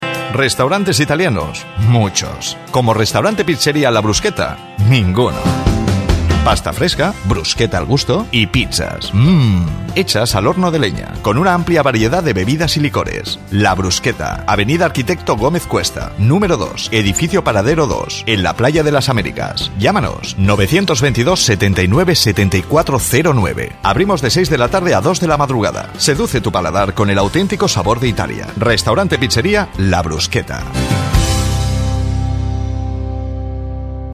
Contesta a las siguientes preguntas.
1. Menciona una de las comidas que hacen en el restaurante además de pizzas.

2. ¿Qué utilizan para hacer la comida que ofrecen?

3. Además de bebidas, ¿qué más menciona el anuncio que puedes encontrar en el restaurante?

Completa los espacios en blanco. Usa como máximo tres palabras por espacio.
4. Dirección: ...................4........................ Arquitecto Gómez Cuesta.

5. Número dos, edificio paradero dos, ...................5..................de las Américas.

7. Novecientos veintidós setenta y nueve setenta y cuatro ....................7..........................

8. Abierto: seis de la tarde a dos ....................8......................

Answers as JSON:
{"1": "Pasta fresca/bruscheta al gusto", "2": "hornos a leña", "3": "licores", "4": "avenida", "5": "en la Playa", "7": "cero nueve/09", "8": "de la madrugada"}